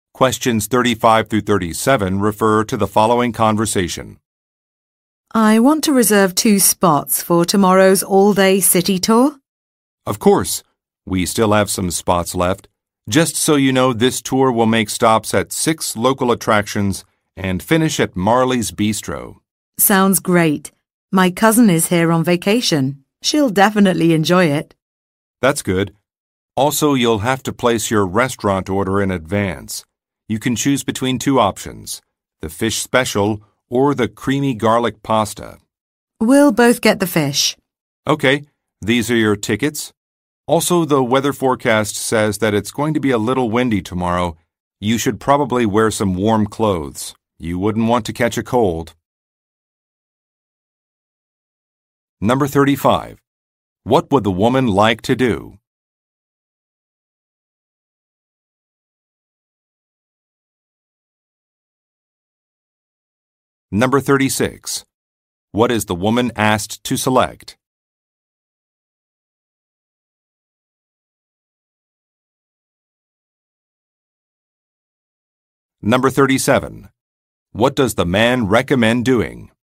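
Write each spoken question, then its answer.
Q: What would the woman like to do?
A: Reserve two spots on a city tour

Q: What is the woman asked to select?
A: A restaurant meal option

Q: What does the man recommend doing?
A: Wearing warm clothes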